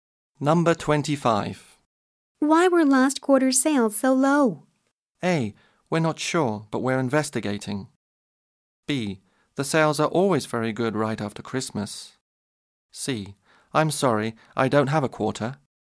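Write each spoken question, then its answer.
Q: Why were last quarter's sales so low?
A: A: We're not sure, but we're investigating.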